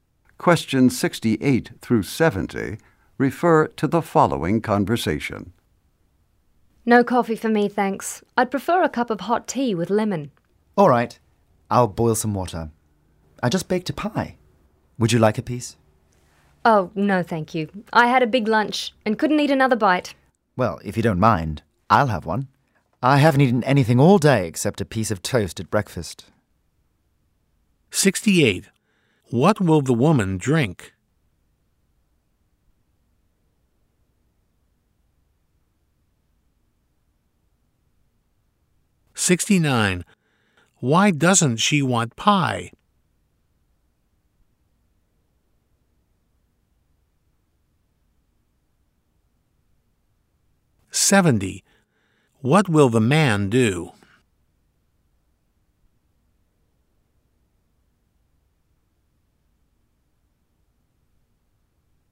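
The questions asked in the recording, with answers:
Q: What will the woman drink?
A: Hot tea with lemon

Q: Why doesn't she want pie?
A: She had a big lunch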